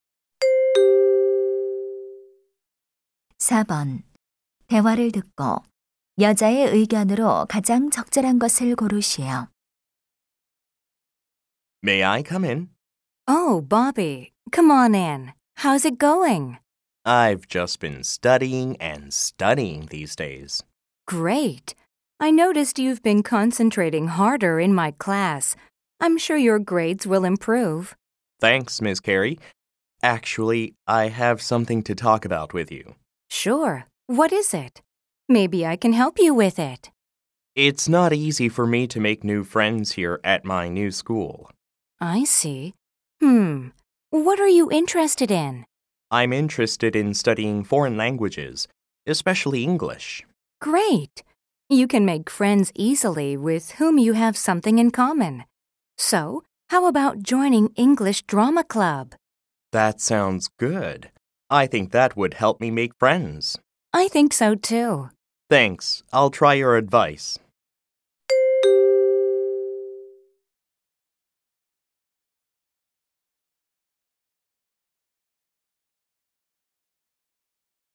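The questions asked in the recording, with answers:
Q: 대화를 듣고 여자의 의견으로 가장 적절한 것을 고르시오.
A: 공통 관심사가 있는 사람과 쉽게 친구가 될 수 있다 (영어 연극 동아리 가입)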